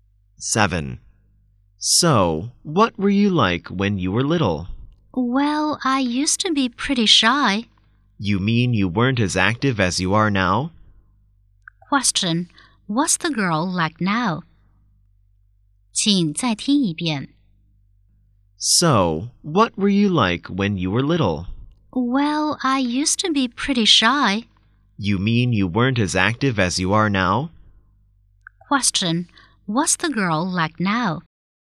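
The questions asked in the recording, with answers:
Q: what's the girl like now?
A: She is active.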